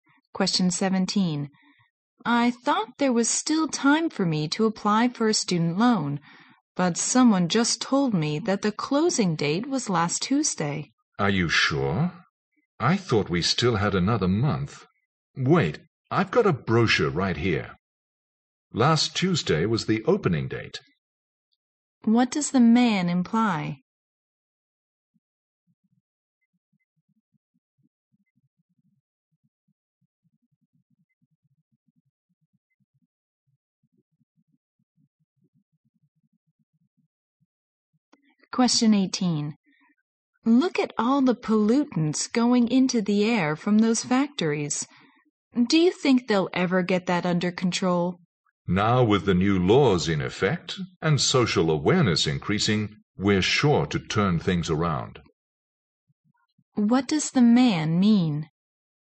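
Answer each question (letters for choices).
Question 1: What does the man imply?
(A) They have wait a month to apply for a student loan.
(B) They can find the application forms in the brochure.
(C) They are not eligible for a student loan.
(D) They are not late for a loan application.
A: D

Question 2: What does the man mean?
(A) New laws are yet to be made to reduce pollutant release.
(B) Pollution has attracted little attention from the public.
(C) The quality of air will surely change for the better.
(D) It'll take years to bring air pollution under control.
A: C

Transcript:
W: I thought there were still time for me to apply for a student loan, but someone just told me that the closing date was last Tuesday.
M: Are you sure? I thought we still had another month. Wait. I got a brochure right here. Last Tuesday was the opening date.
Q: What does the man imply?
W: Look at all the pollutants going into the air from those factories. 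Do you think they'll ever get that under control?
M: Now with the new laws in effect and social awareness increasing, we are sure to turn things around.

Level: 六级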